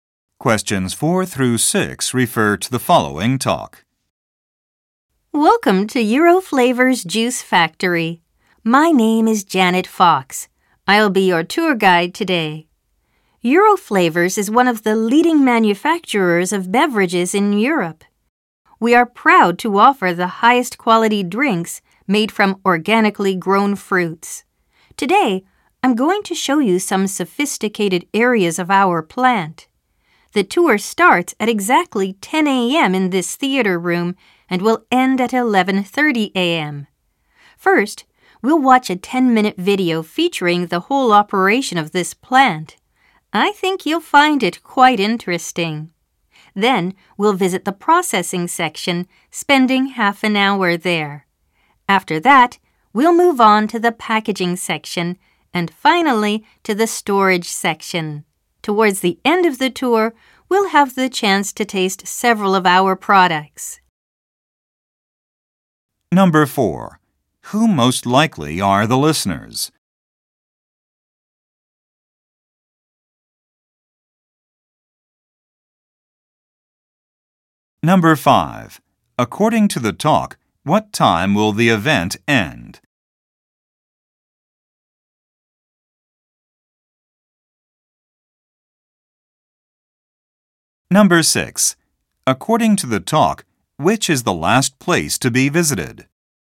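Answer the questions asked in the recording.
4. Tour participants at a juice factory
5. 11:30 a.m.
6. The storage section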